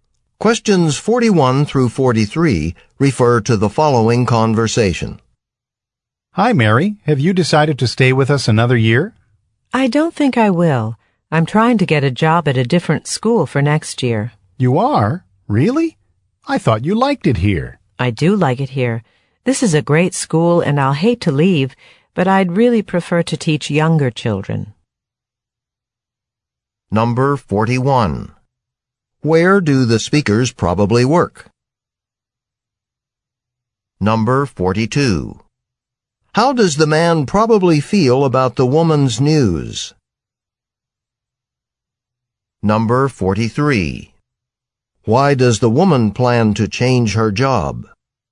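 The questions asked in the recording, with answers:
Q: Where do the speakers probably work?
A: At a school

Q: Why does the woman plan to change her job?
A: She prefers to teach younger children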